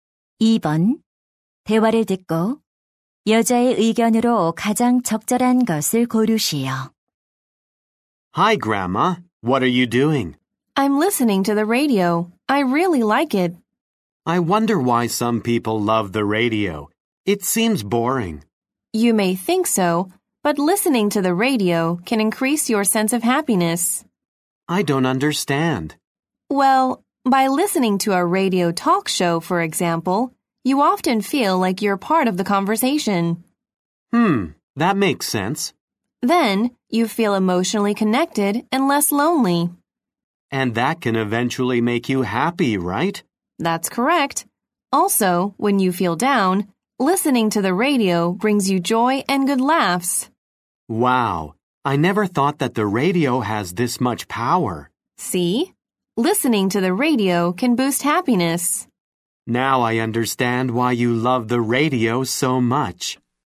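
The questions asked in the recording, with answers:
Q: 대화를 듣고 여자의 의견으로 가장 적절한 것을 고르시오.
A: 라디오를 듣는 것은 행복감을 높일 수 있다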